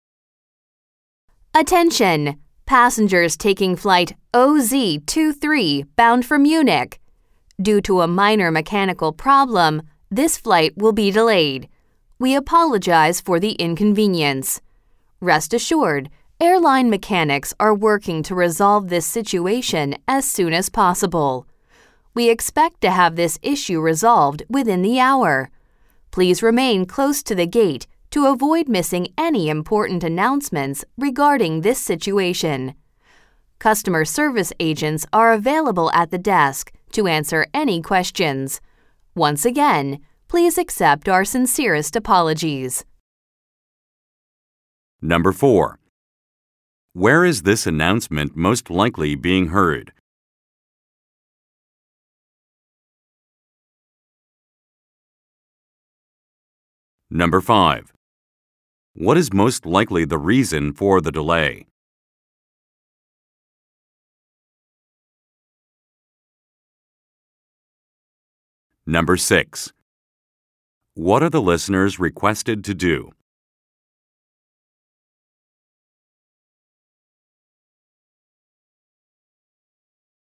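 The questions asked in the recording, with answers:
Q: Where is this announcement most likely being heard?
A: At an airport gate

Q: What is most likely the reason for the delay?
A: A minor mechanical problem

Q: What are the listeners requested to do?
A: Stay close to the gate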